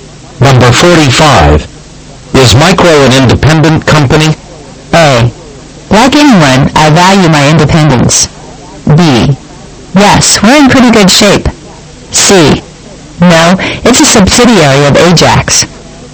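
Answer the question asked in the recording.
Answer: C: No, it's a subsidiary of Ajax.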